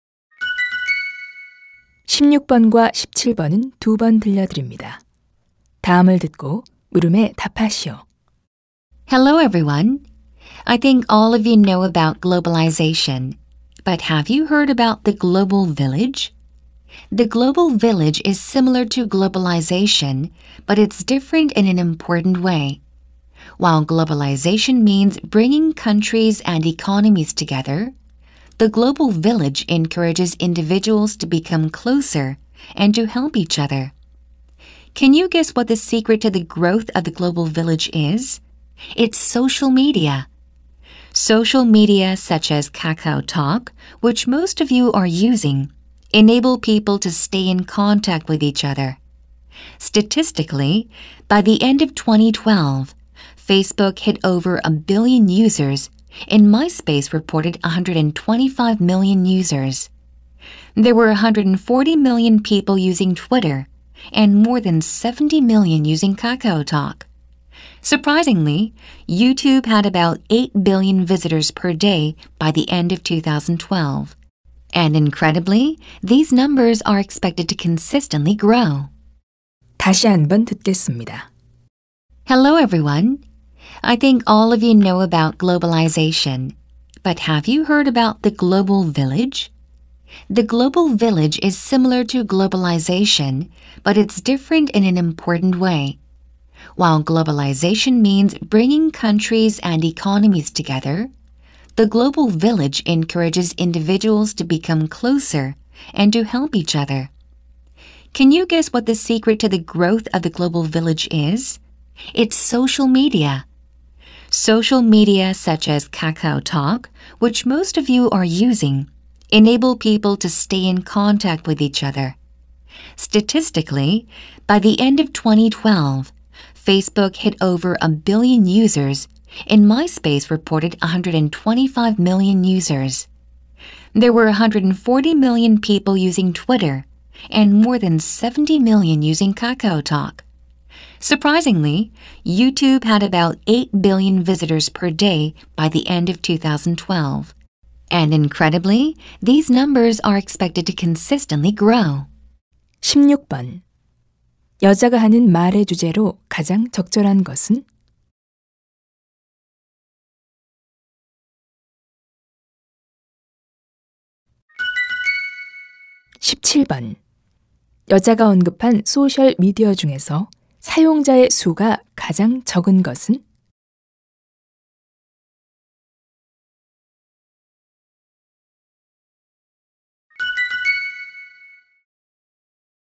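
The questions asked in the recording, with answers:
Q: 여자가 하는 말의 주제로 가장 적절한 것은?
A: 소셜 미디어를 통한 지구촌의 성장

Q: 여자가 언급한 소셜 미디어 중에서 사용자의 수가 가장 적은 것은?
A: KakaoTalk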